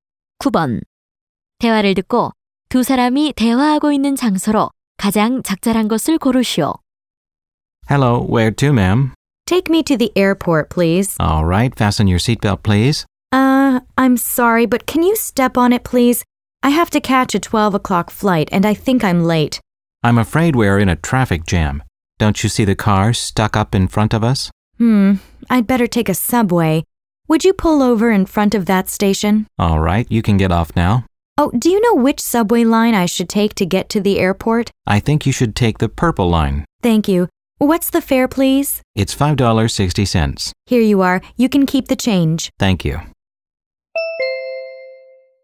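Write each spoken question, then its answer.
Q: 대화를 듣고 두 사람이 대화하고 있는 장소로 가장 적절한 곳을 고르시오.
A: 택시 안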